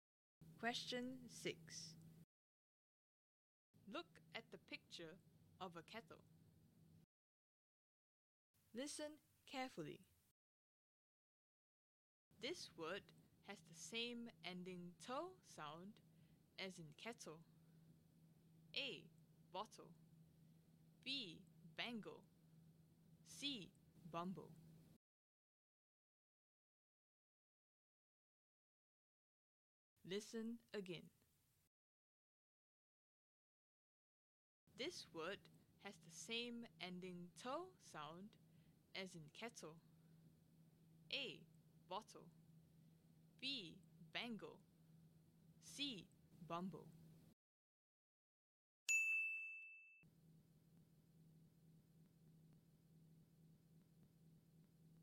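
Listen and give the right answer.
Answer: A: Bottle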